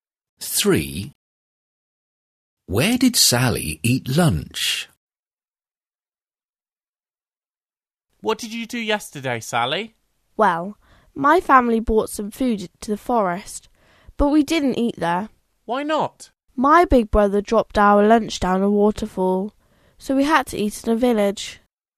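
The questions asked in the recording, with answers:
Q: Where did Sally eat lunch?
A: In a village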